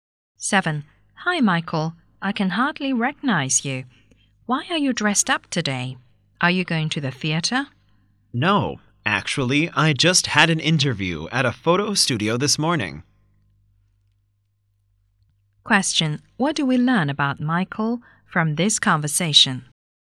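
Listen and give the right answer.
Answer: He had an interview at a photo studio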